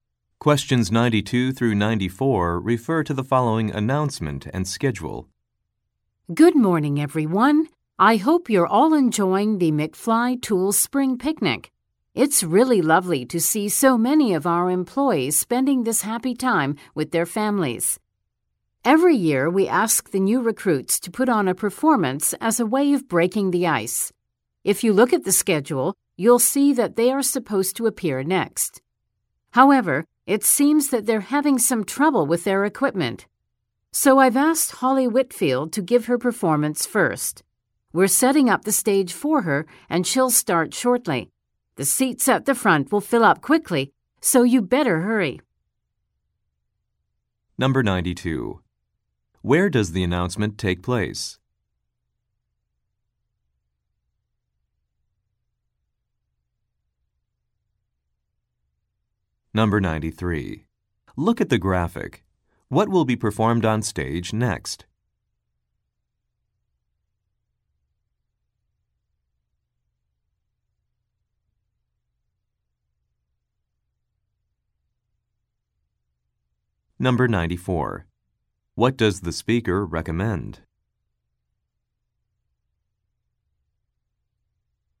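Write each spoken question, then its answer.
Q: Where does the announcement take place?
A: At a company picnic

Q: What does the speaker recommend?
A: Hurrying to get seats at the front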